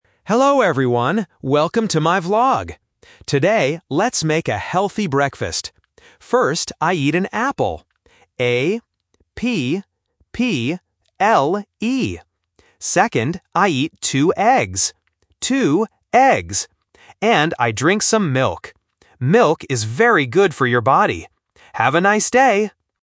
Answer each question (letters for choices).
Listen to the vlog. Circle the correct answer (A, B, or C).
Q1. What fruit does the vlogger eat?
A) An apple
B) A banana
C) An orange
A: A

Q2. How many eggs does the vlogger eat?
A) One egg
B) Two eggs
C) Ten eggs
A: B

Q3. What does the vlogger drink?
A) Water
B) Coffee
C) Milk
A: C

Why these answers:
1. The vlogger explicitly says "I eat an apple" and spells the word "A-P-P-L-E". Options B (banana) and C (orange) are traps because they are common healthy fruits, but they are not mentioned in the audio.
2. The vlogger clearly states, "I eat two eggs," and repeats the phrase "Two eggs" (A1 repetition technique). Option A (One egg) is a trap using a different number. Option C (Ten eggs) is a common phonetic trap because "Two" and "Ten" start with the same sound and confuse beginners.
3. The vlogger says directly, "And I drink some milk." Options A (Water) and B (Coffee) are plausible morning drinks, but they are not in the audio.

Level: A1